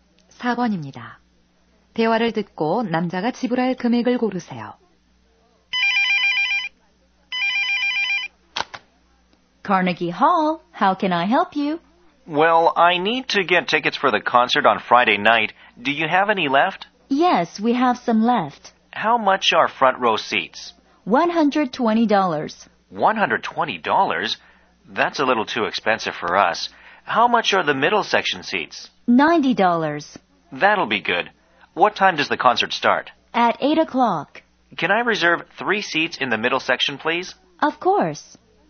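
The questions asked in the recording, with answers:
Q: 대화를 듣고 남자가 지불할 금액을 고르세요.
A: 270달러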